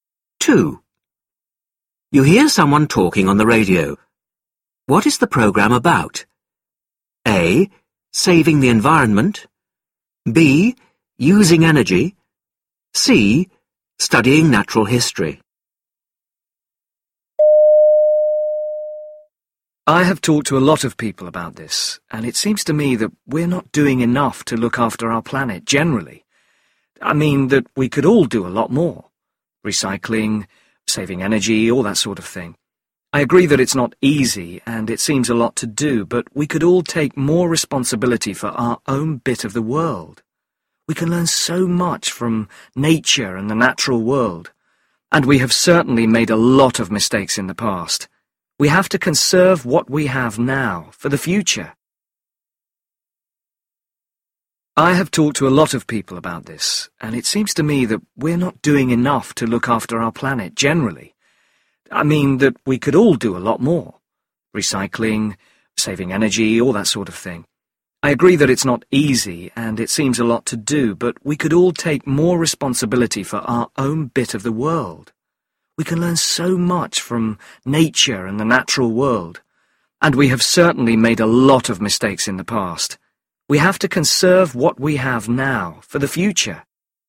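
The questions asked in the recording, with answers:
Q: What is the programme about?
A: A: Saving the environment.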